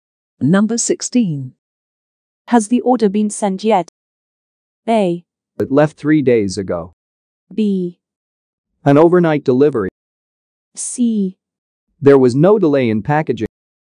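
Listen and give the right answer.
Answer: A: It left 3 days ago.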